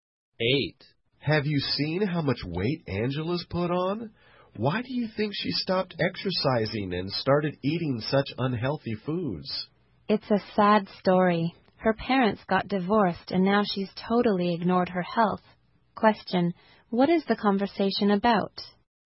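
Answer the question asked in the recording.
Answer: Angela gained weight and ignored her health after her parents' divorce.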